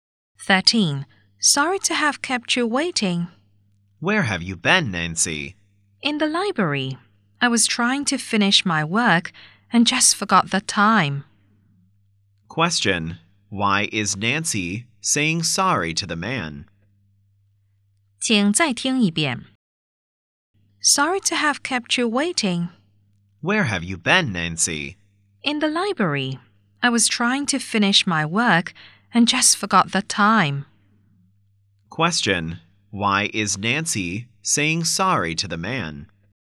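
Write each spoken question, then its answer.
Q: why is Nancy saying sorry to the man?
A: She kept him waiting because she forgot the time in the library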